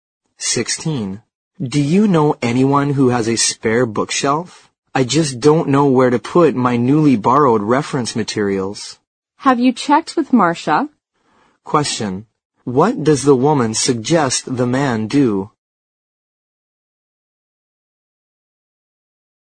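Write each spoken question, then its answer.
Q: What does the woman suggest the man do?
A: Ask Marcia whether she has a spare bookshelf.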